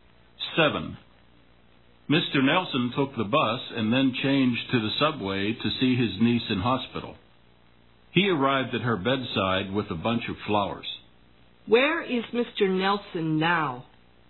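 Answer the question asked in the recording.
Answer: In the hospital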